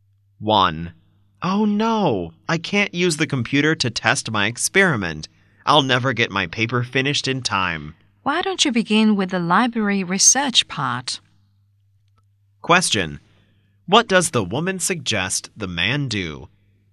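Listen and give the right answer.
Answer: Begin with the library research part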